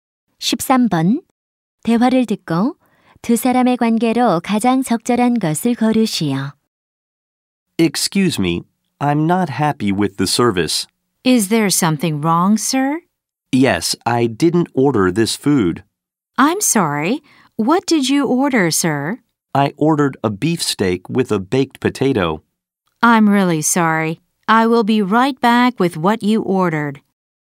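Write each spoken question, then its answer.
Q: 대화를 듣고 두 사람의 관계로 가장 적절한 것을 고르시오.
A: 손님과 종업원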